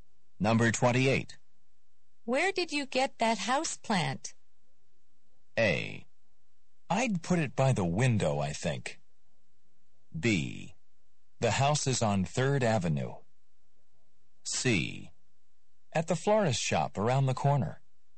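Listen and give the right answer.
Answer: C: At the florist shop around the corner.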